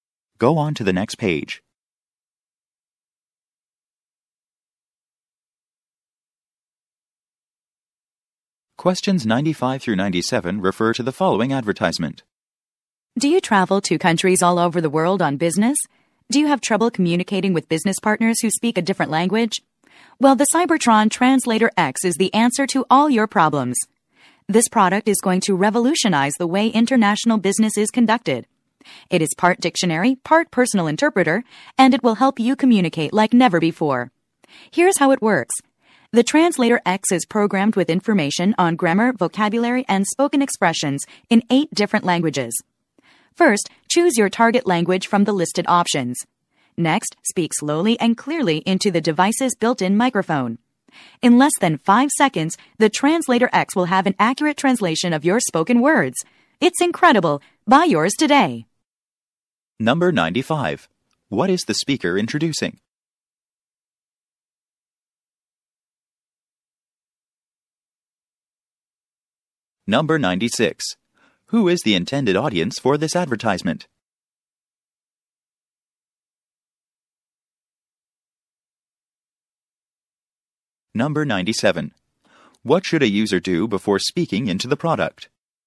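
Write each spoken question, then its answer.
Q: What is the speaker introducing?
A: A translation device

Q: Who is the intended audience for this advertisement?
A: International business travelers

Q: What should a user do before speaking into the product?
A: Choose a target language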